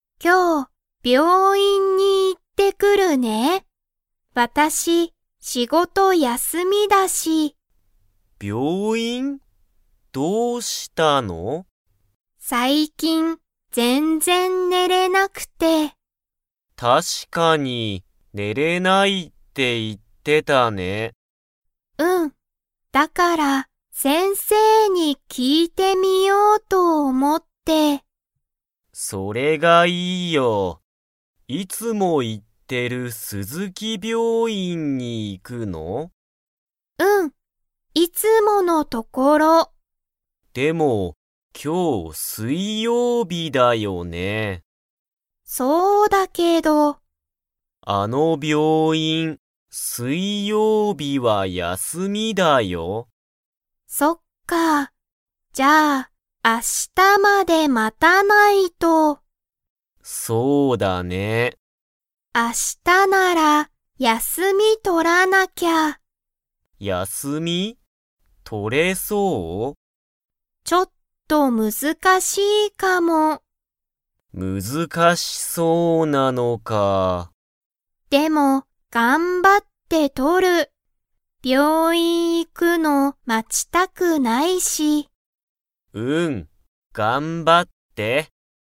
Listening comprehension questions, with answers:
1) ハルカは、最近さいきん____。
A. 休(やす)みがない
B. 仕事(しごと)ができない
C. 病院(びょういん)が好すきじゃない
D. 全然ぜんぜん寝ねれない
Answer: D. 全然ぜんぜん寝ねれない

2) 鈴木(すずき)病院(びょういん)は、今日きょう休やすみですか?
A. はい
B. いいえ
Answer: A. はい

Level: Level 2

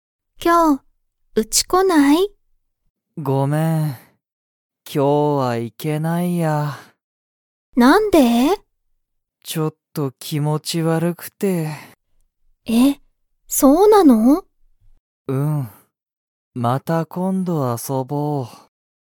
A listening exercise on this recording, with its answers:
カイトはちょっと____。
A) 気持きもち悪わるい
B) 気持きもちいい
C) ユリのうちに行いく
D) ユリと遊あそびたい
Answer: A) 気持きもち悪わるい

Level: Level 1

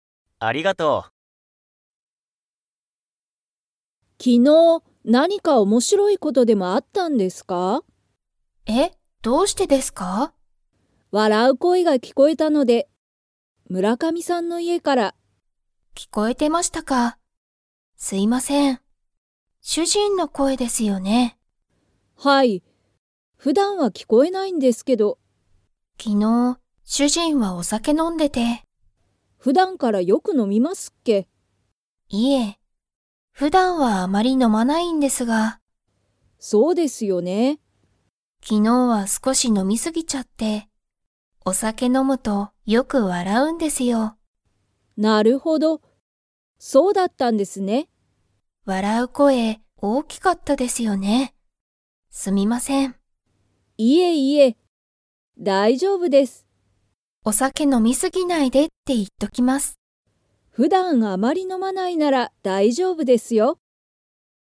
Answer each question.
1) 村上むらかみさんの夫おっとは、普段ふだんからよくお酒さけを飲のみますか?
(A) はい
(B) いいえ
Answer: (B) いいえ

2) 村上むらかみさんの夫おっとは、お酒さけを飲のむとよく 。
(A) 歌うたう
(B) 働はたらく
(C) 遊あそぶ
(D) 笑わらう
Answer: (D) 笑わらう

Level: Level 3

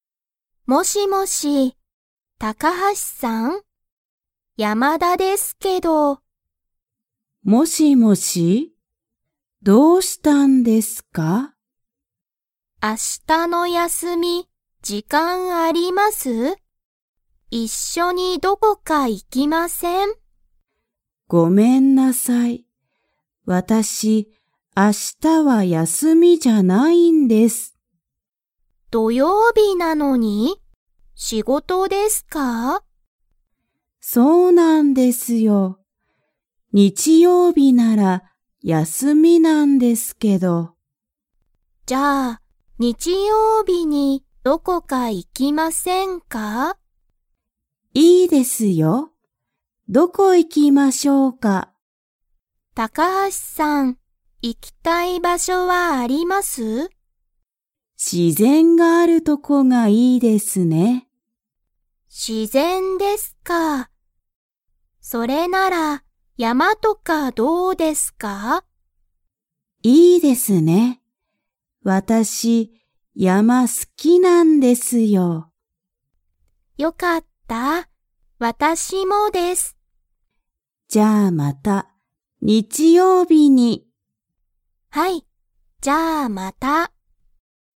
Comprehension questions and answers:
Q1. 高橋(たかはし)さんは、明日(あした)の休(やす)み、時間(じかん)がありますか?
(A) はい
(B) いいえ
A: (B) いいえ

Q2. 高橋(たかはし)さんと山田(やまだ)さんは____、山(やま)に行(い)く。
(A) 日曜日(にちようび)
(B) 土曜日(どようび)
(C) 今日(きょう)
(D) 明日(あした)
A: (A) 日曜日(にちようび)

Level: Level 2

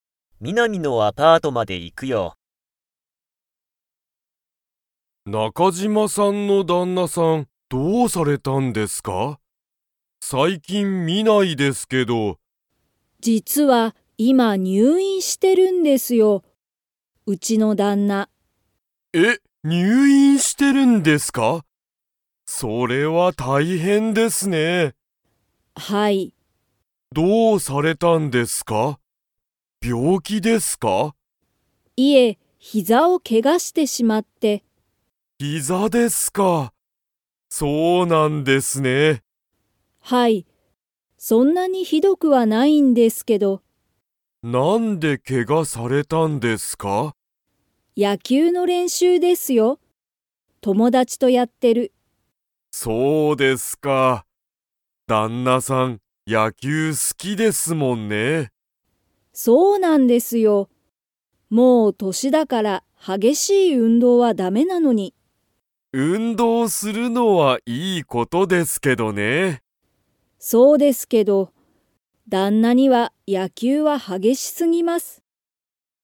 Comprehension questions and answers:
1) 中島なかじまさんの旦那だんなさんは、どこをけがしましたか?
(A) 膝ひざ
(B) 足あし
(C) 頭あたま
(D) 腕うで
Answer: (A) 膝ひざ

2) 中島なかじまさんの旦那だんなさんは野球やきゅうが 。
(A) 好すき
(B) 嫌きらい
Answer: (A) 好すき

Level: Level 4

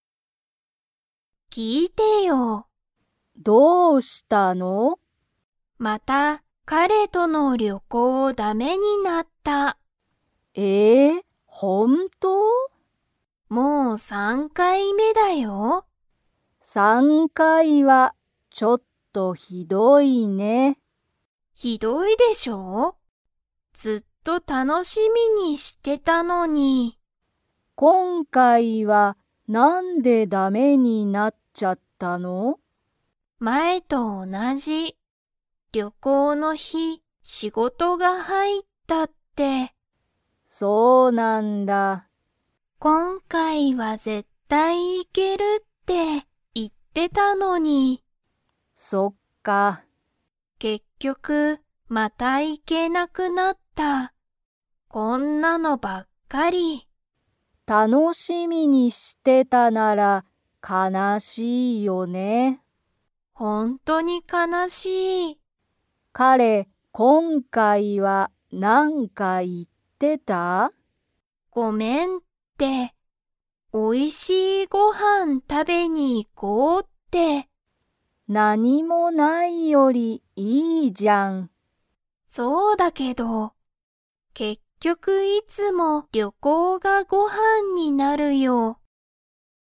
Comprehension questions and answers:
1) ゆりと彼かれの旅行りょこうがだめになったのは、何回目なんかいめですか?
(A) 一回いっかい目め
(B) 二回にかい目め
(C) 三回さんかい目め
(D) 四回よんかい目め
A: (C) 三回さんかい目め

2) ゆりは旅行りょこうがだめになって 。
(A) 嬉うれしい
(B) 悲かなしい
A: (B) 悲かなしい

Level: Level 3

